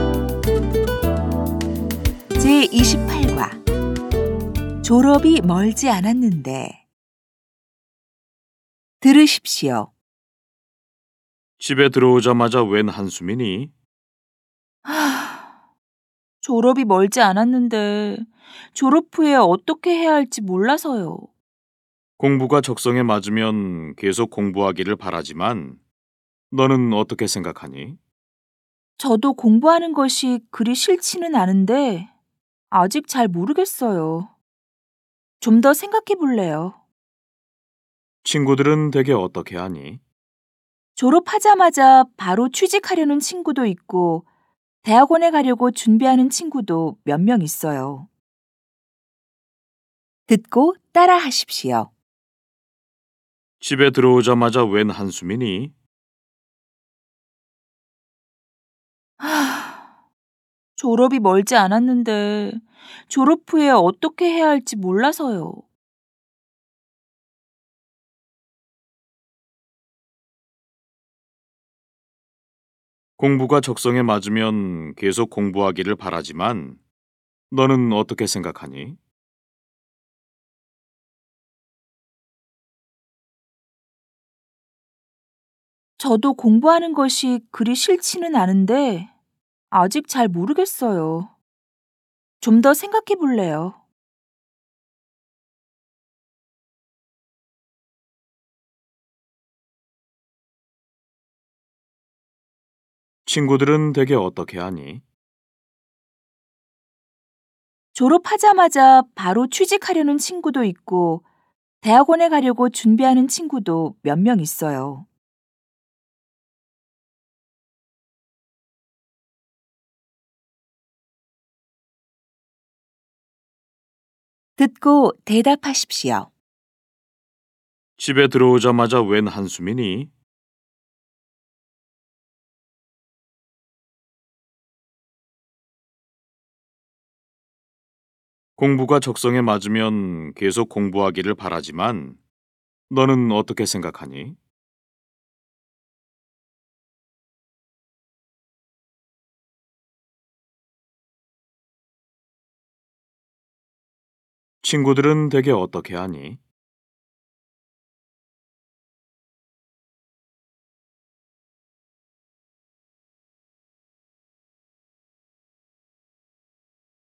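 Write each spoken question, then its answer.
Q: 집에 들어오자마자 웬 한숨이니?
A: 졸업이 멀지 않았는데 졸업 후에 어떻게 해야 할지 몰라서요.

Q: 공부가 적성에 맞으면 계속 공부하기를 바라지만 너는 어떻게 생각하니?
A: 공부하는 것이 그리 싫지는 않은데 아직 잘 모르겠어요. 좀 더 생각해 볼래요.

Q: 친구들은 대개 어떻게 하니?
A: 바로 취직하려는 친구도 있고 대학원에 가려고 준비하는 친구도 몇 명 있어요.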